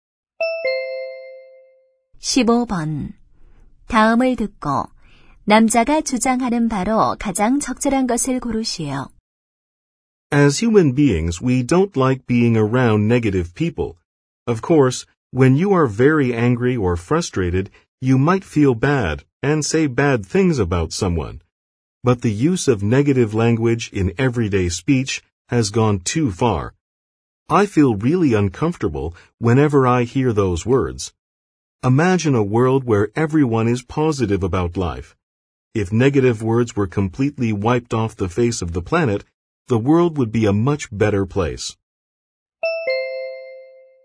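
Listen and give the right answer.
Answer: 부정적인 말을 쓰지 말아야 한다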